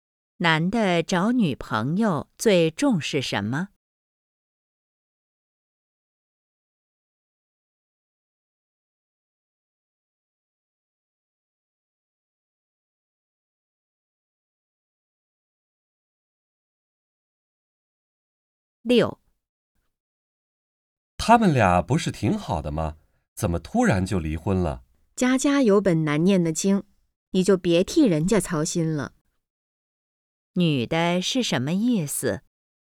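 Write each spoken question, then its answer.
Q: 女的是什么意思?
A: 每家都有难处,别替别人操心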